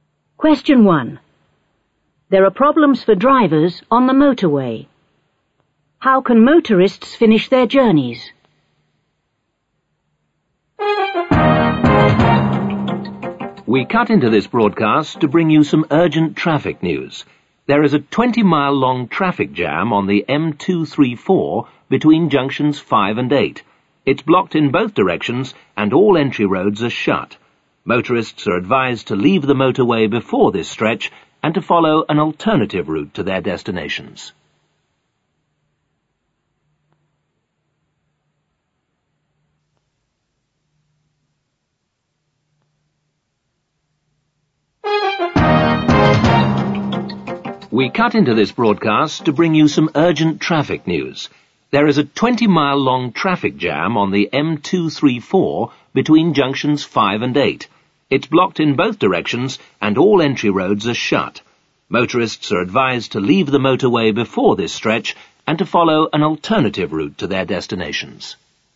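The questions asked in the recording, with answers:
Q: How can motorists finish their journeys?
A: Leave the motorway before the blocked stretch and follow an alternative route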